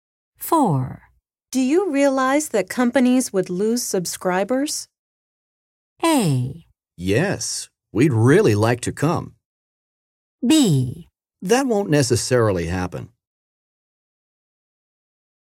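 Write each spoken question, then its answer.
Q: Do you realize that companies would lose subscribers?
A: B: That won't necessarily happen.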